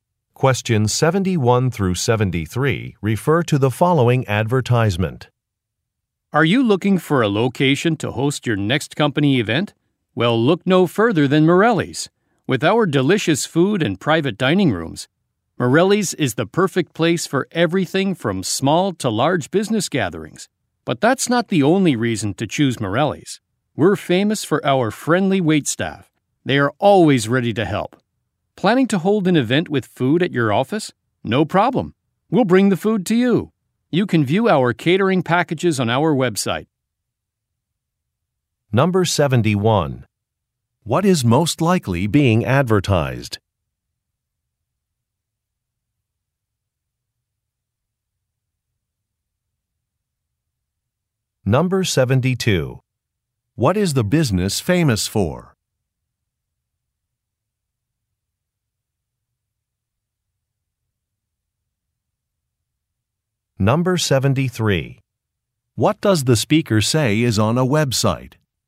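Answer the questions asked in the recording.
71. A restaurant
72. Its friendly waitstaff
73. Catering packages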